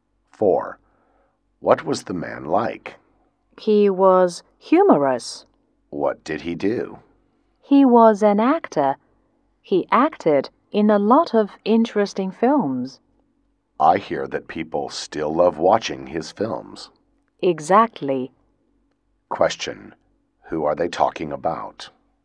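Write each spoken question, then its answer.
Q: Who are they talking about?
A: An actor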